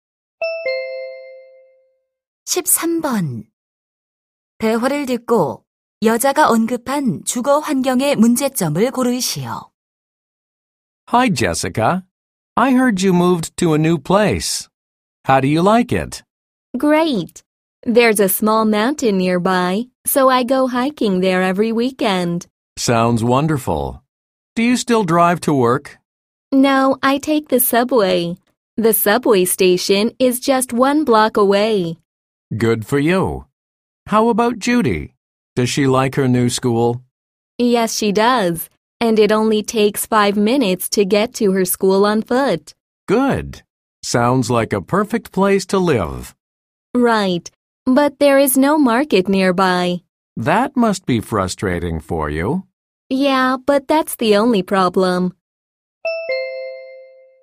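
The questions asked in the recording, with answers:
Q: 대화를 듣고 여자가 언급한 주거 환경의 문제점을 고르시오.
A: 근처에 시장이 없다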